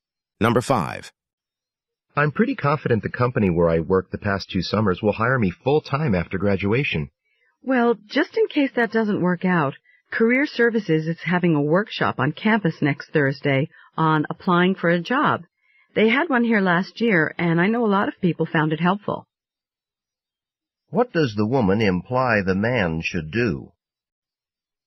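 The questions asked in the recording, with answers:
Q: What does the woman imply the man should do?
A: Go to the Career Services job-application workshop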